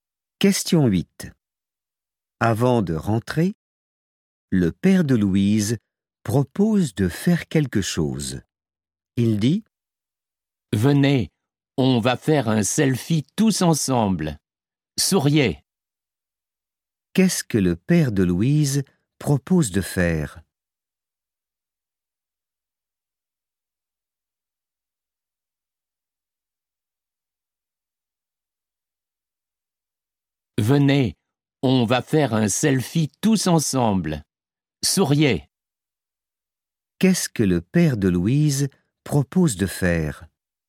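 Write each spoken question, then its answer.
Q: Qu'est-ce que le père de Louise propose de faire ?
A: Faire un selfie tous ensemble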